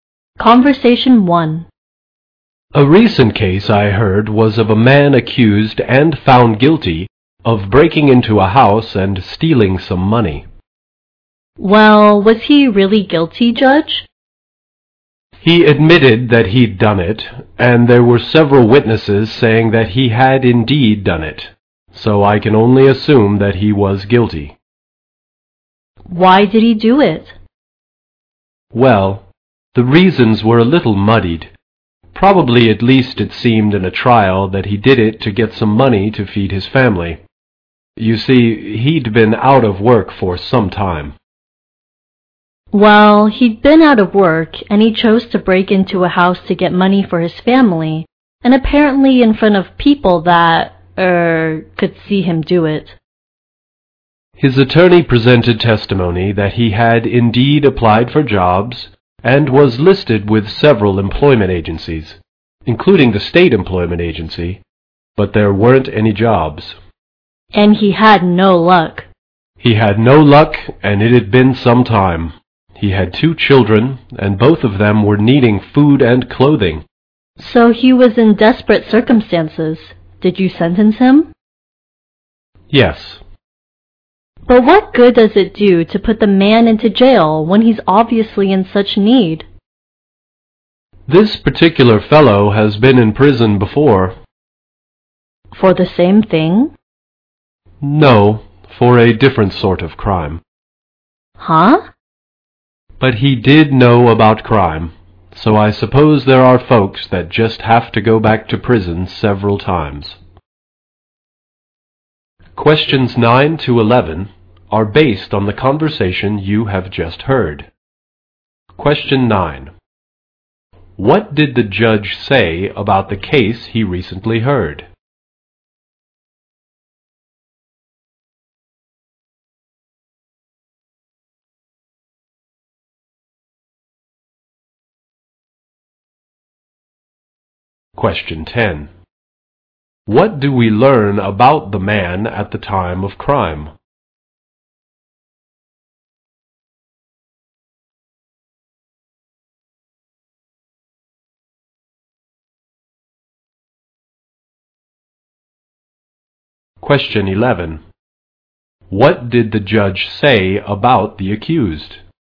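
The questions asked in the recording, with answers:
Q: What did the judge say about the case he recently heard?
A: A man was found guilty of breaking into a house and stealing money.

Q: What do we learn about the man at the time of crime?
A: He had been out of work for some time and needed money to feed his family.

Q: What did the judge say about the accused?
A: He had been in prison before for a different crime.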